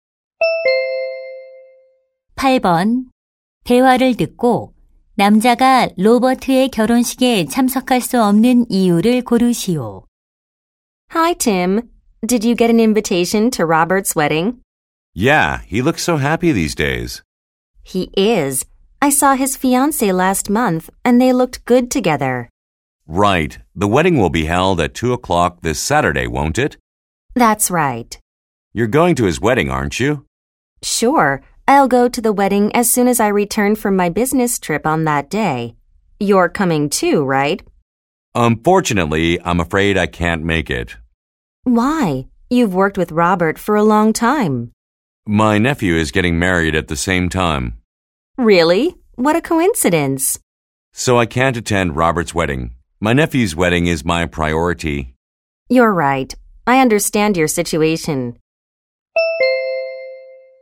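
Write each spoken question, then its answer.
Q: 대화를 듣고 남자가 로버트의 결혼식에 참석할 수 없는 이유를 고르시오.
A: 같은 시간에 조카가 결혼해서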